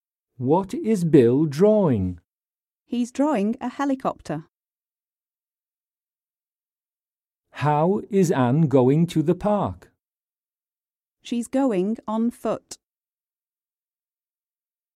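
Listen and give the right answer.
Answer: A helicopter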